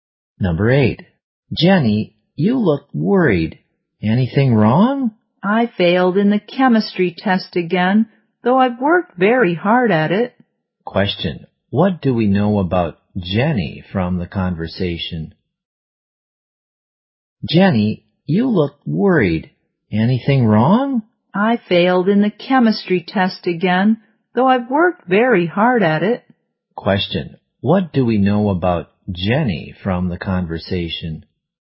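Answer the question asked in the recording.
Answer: She failed the chemistry test again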